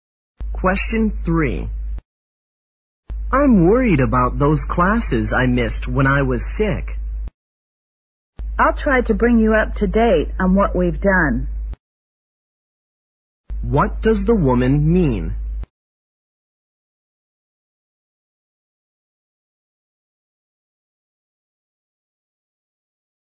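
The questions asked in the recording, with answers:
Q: What does the woman mean?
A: She will help him catch up on the classes he missed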